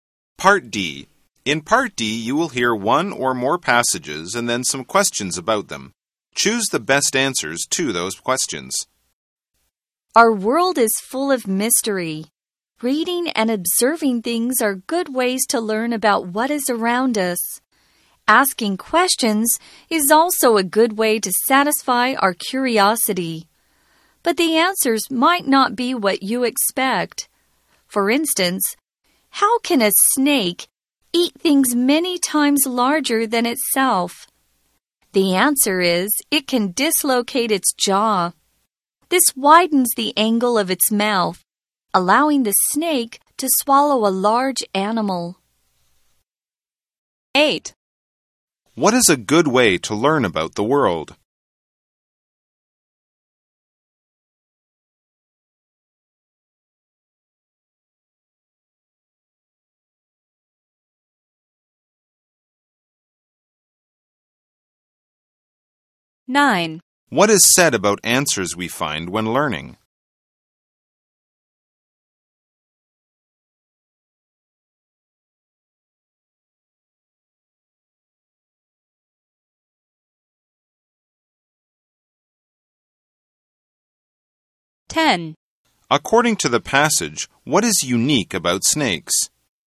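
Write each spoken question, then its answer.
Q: What is a good way to learn about the world?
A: Reading and observing things, and asking questions

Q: What is said about answers we find when learning?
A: They might not be what you expect

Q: According to the passage, what is unique about snakes?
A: A snake can dislocate its jaw to swallow animals much larger than itself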